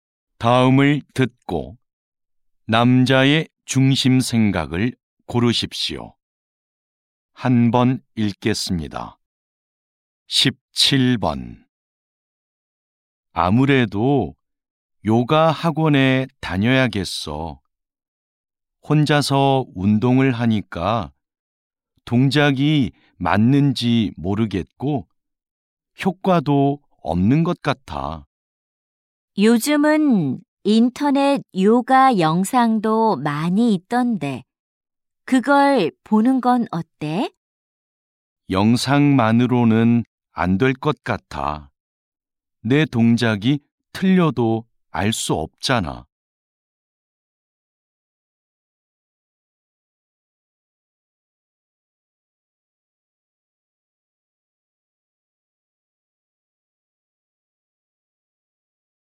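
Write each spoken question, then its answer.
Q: 다음을 듣고 남자의 중심 생각을 고르십시오.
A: 동작을 바르게 배우려면 학원에 다니며 직접 지도를 받아야 한다.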